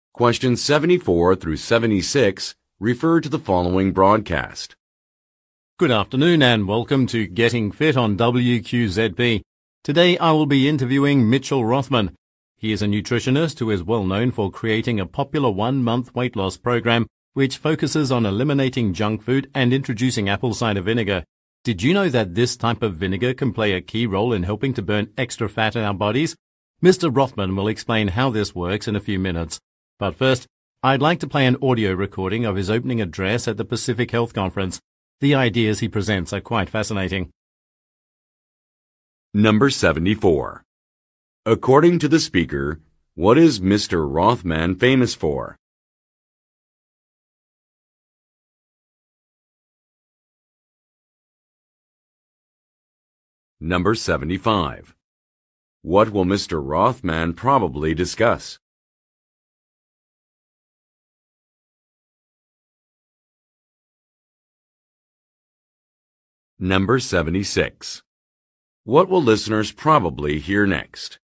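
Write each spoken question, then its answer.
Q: According to the speaker, what is Mr. Rothman famous for?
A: Creating a popular one-month weight loss program

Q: What will Mr. Rothman probably discuss?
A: How apple cider vinegar helps burn extra body fat

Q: What will listeners probably hear next?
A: A recording of his opening address at the Pacific Health Conference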